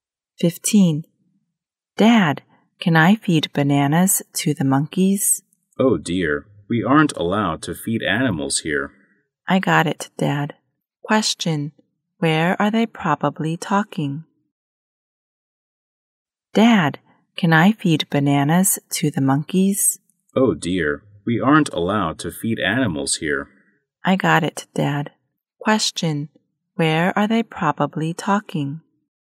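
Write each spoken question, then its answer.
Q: Where are they probably talking?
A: At the zoo.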